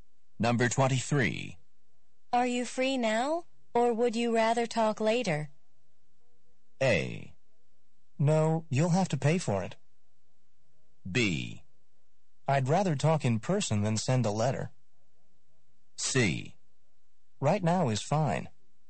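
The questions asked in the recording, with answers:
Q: Are you free now, or would you rather talk later?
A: C: Right now is fine.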